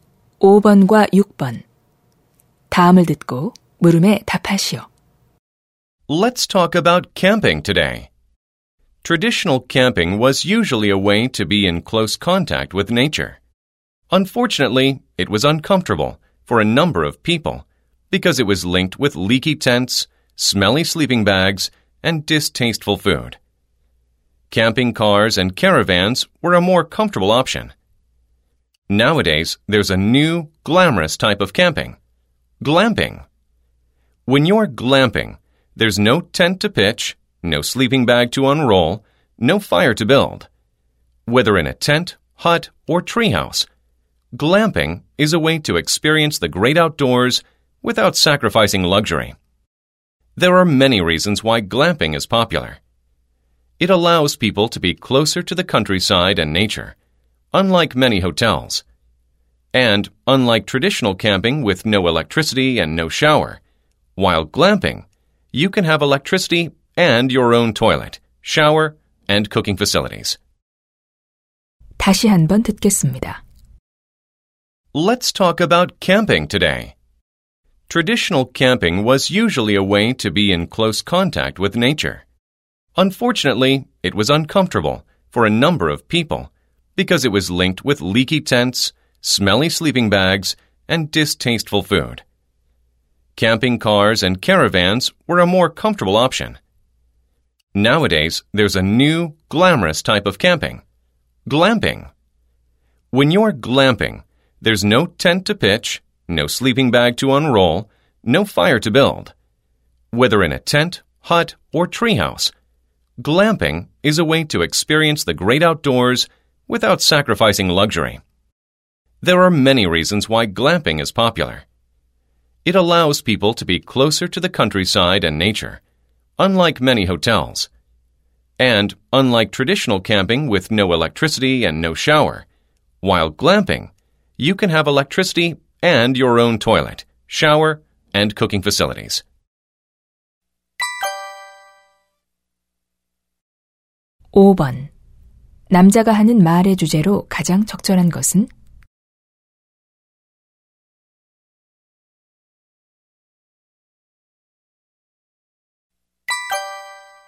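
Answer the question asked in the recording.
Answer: 글램핑이 인기 있는 이유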